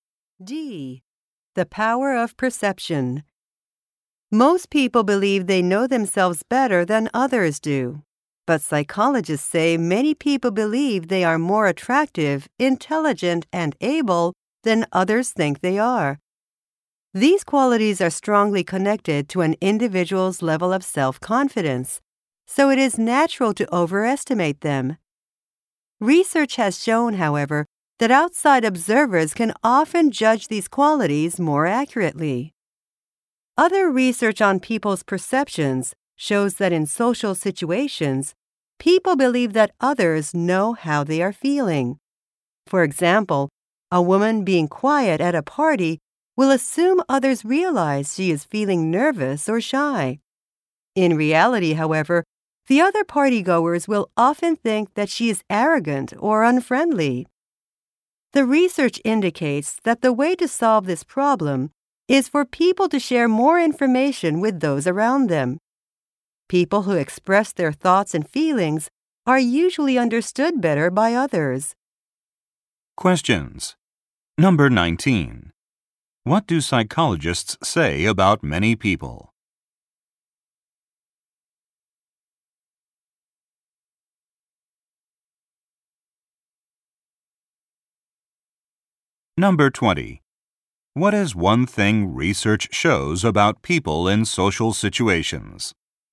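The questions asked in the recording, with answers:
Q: What do psychologists say about many people?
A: They think they are more attractive, intelligent and able than others think they are.

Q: What is one thing research shows about people in social situations?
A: They wrongly believe others know how they are feeling.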